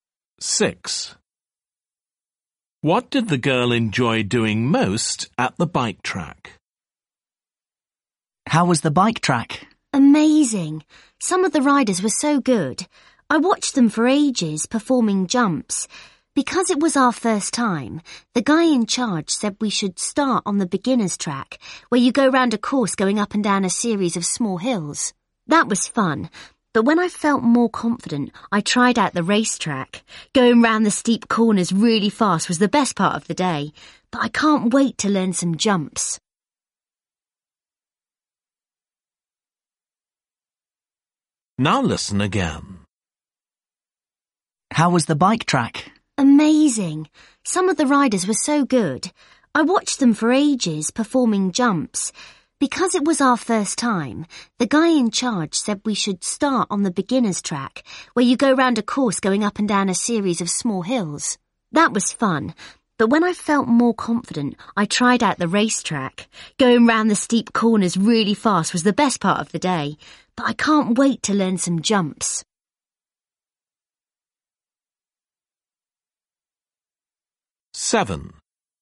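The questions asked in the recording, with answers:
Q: What did the girl enjoy doing most at the bike track?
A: Going round the steep corners fast on the racetrack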